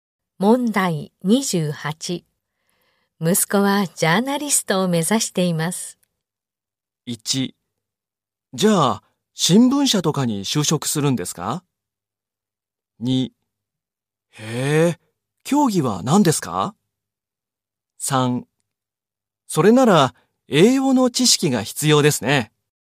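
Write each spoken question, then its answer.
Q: 息子はジャーナリストを目指しています。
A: 1: じゃあ、新聞社とかに就職するんですか?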